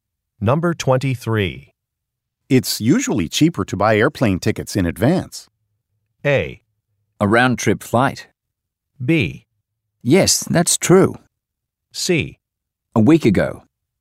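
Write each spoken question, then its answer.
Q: It's usually cheaper to buy airplane tickets in advance.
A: B: Yes, that's true.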